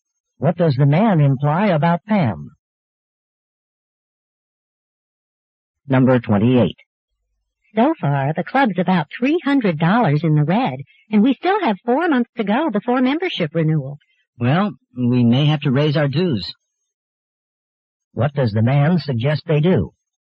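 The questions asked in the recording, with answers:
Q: What does the man suggest they do?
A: Raise the club's dues.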